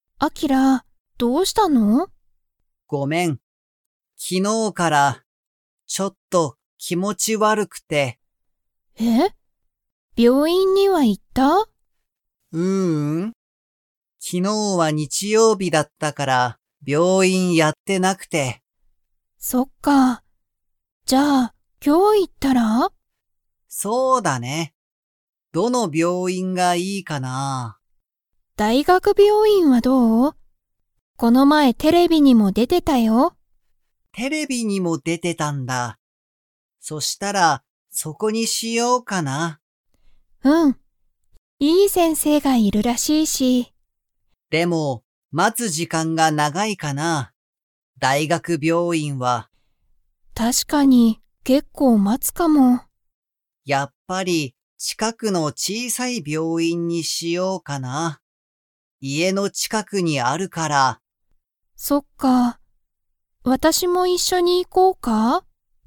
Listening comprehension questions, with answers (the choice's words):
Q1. アキラは、昨日(きのう)から____。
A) ちょっと気持(きも)ち悪(わる)い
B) 結構待(けっこうま)っている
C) ずっと病院(びょういん)にいる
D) よくテレビを見(み)ている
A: ちょっと気持(きも)ち悪(わる)い

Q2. アキラは、大学病院(だいがくびょういん)に行(い)きますか?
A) はい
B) いいえ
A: いいえ

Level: Level 2